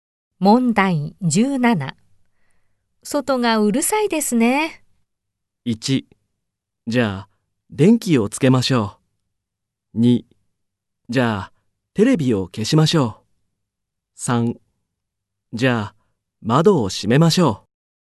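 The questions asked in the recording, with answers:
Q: 外がうるさいですね。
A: 3: じゃあ、窓を閉めましょう。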